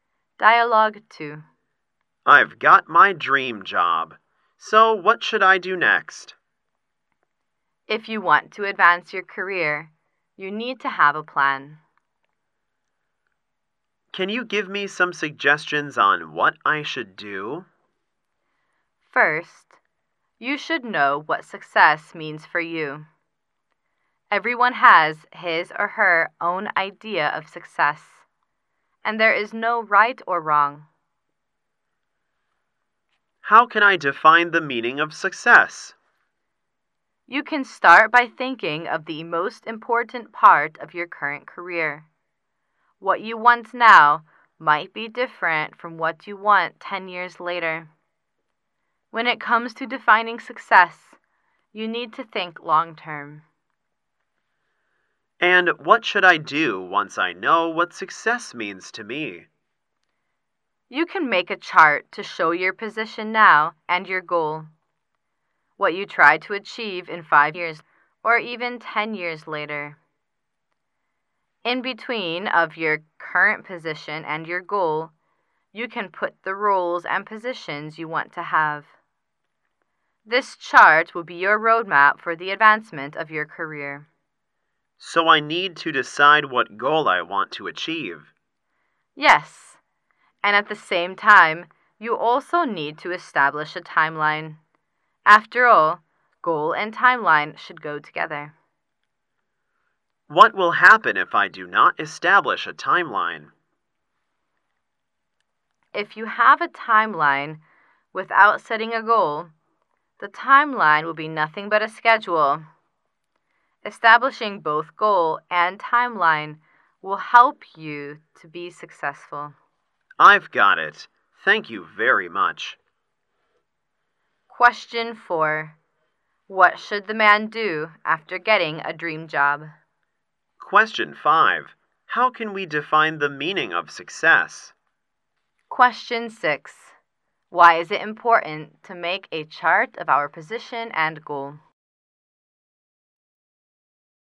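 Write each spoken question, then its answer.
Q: What should the man do after getting a dream job?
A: Make a plan to advance his career

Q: How can we define the meaning of success?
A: By thinking of the most important part of your current career and thinking long term

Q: Why is it important to make a chart of our position and goal?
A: It becomes a roadmap for career advancement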